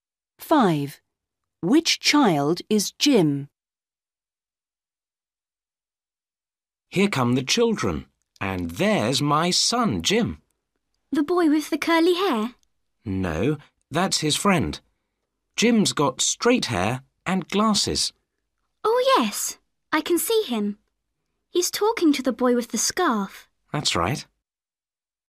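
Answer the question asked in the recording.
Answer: the boy with straight hair and glasses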